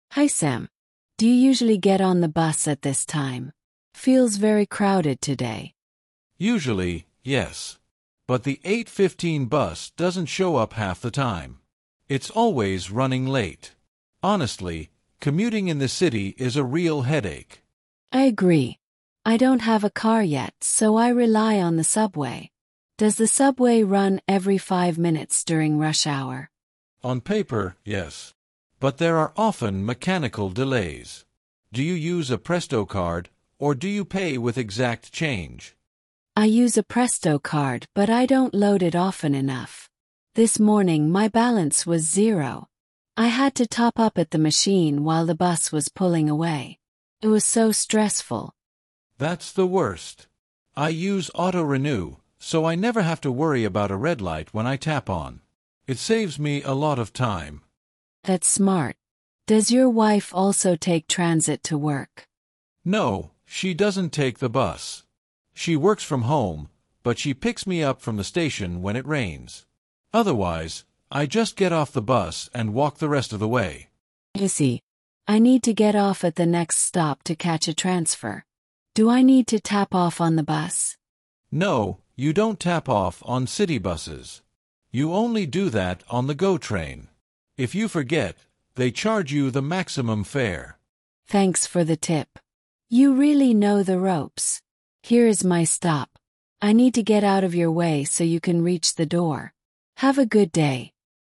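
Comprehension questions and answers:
II. Answer the following questions:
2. Why does Sam say the 8:15 bus is a real headache?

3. Does Elena own a car to get to her new job?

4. What happens on paper that doesn't always happen in reality?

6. How does Sam's card stay loaded without him going to a machine?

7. According to Sam, what is a major benefit of using auto-renew?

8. Does Elena need to tap off when she exits the city bus?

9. On which specific type of transportation must you tap off?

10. What happens if a passenger forgets to tap off on the GO Train?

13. What is the environment like on the bus during rush hour?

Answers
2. It doesn't show up half the time and is always running late.
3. No, she doesn't have a car yet.
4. The subway runs every five minutes during rush hour.
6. He uses auto-renew.
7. He never has to worry about a red light when he taps on, and it saves him time.
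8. No
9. The GO train
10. They are charged the maximum fare.
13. Very crowded

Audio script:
Elena: Hi Sam! Do you usually get on the bus at this time? It feels very crowded today.
Sam: Usually, yes. But the 8:15 bus doesn't show up half the time. It's always running late. Honestly, commuting in this city is a real headache.
Elena: I agree! I don't have a car yet, so I rely on the subway. Does the subway run every five minutes during rush hour?
Sam: On paper, yes. But there are often mechanical delays. Do you use a Presto card, or do you pay with exact change?
Elena: I use a Presto card, but I don't load it often enough. This morning, my balance was zero! I had to top up at the machine while the bus was pulling away. It was so stressful.
Sam: That's the worst. I use Auto-renew, so I never have to worry about a red light when I tap on. It saves me a lot of time.
Elena: That's smart. Does your wife also take transit to work?
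Sam: No, she doesn't take the bus. She works from home, but she picks me up from the station when it rains. Otherwise, I just get off the bus and walk the rest of the way.
Elena: I see. I need to get off at the next stop to catch a transfer. Do I need to tap off on the bus?
Sam: No, you don't tap off on city buses. You only do that on the GO Train. If you forget, they charge you the maximum fare!
Elena: Thanks for the tip. You really know the ropes! Here is my stop. I need to get out of your way so you can reach the door. Have a good day!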